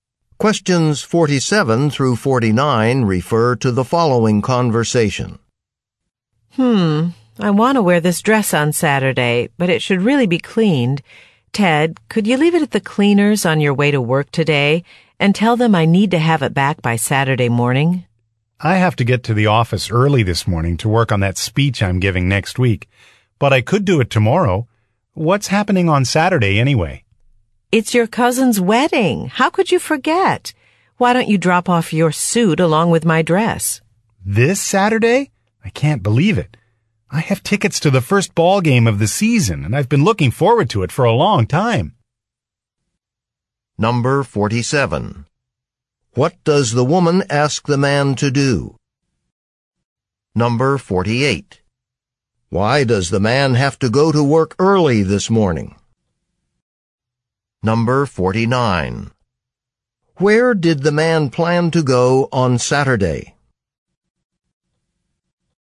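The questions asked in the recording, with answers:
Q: What does the woman ask the man to do?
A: Take her dress to the cleaners

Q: Why does the man have to go to work early this morning?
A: To work on a speech he is giving next week

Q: Where did the man plan to go on Saturday?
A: To a ball game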